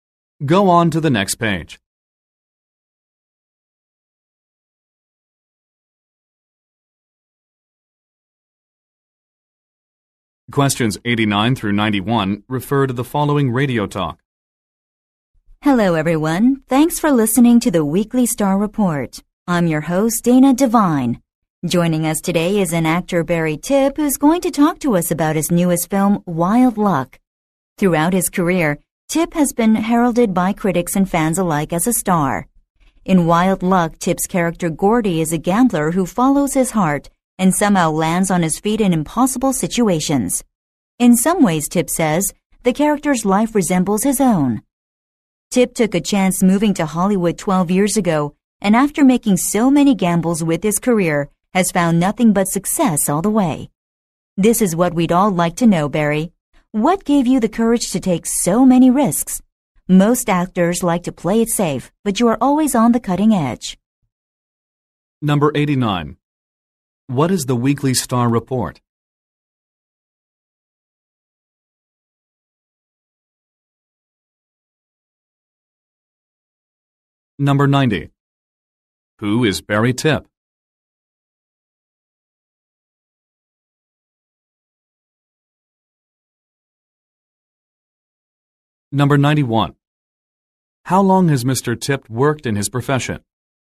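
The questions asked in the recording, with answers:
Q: What is the Weekly Star Report?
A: A radio show

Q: Who is Barry Tipp?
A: An actor

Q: How long has Mr. Tipp worked in his profession?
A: 12 years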